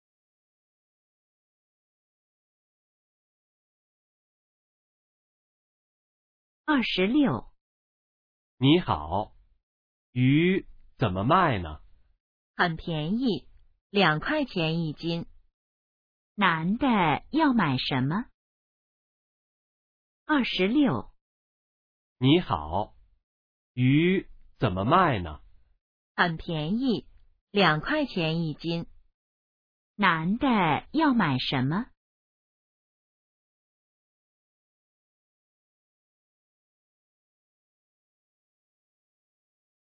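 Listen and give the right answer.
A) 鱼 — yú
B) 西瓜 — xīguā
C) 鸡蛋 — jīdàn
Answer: A) 鱼 — yú

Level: HSK2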